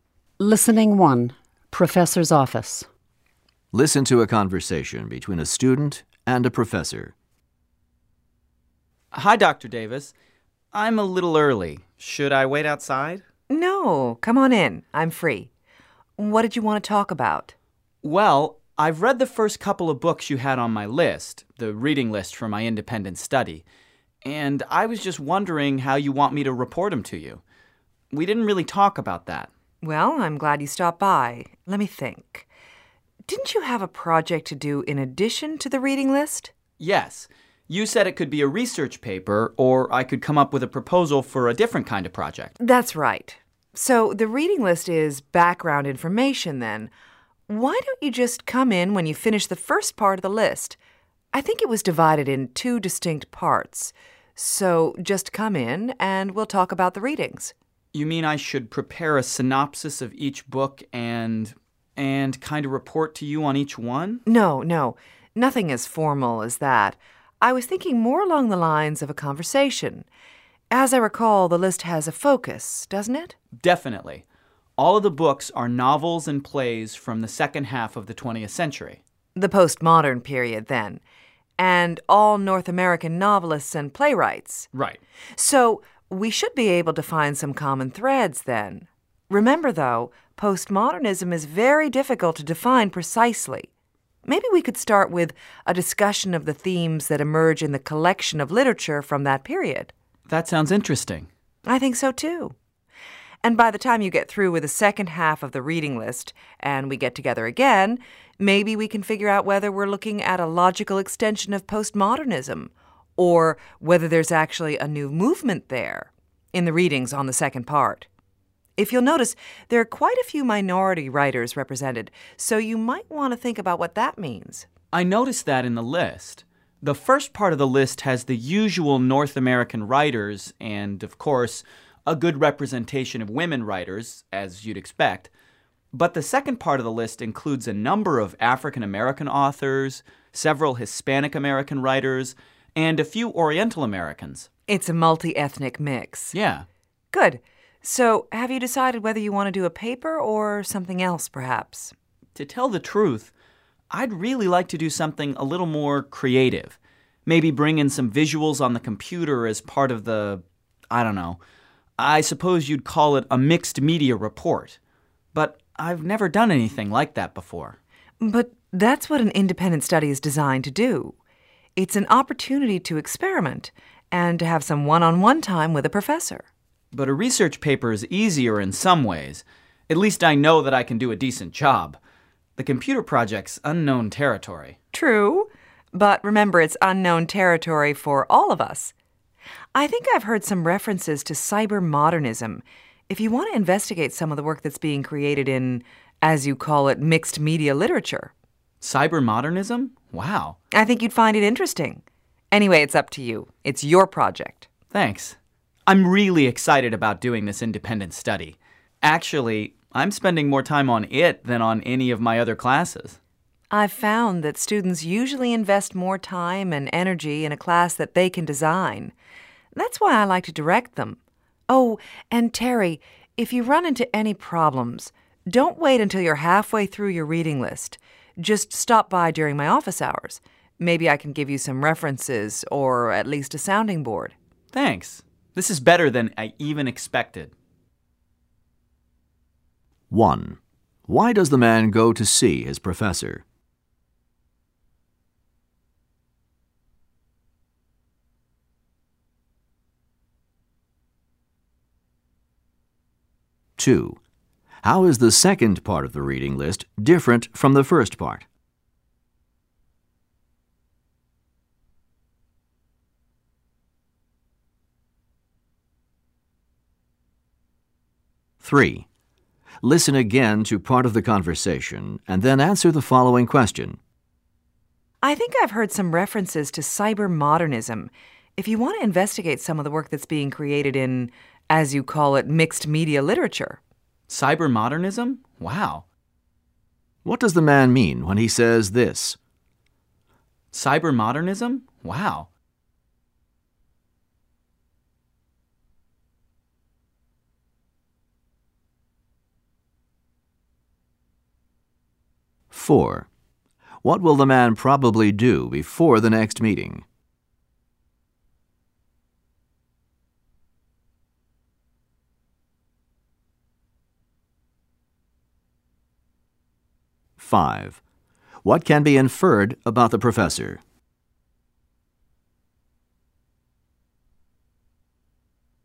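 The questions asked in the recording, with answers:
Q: Why does the man go to see his professor?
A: To ask how to report on the books on his independent study reading list

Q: How is the second part of the reading list different from the first part?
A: It includes more minority (multi-ethnic) writers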